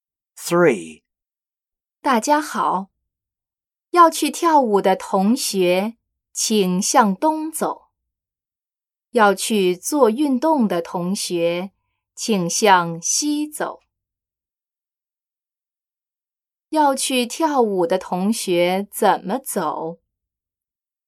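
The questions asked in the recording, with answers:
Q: 要去跳舞的同学怎么走?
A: 向东走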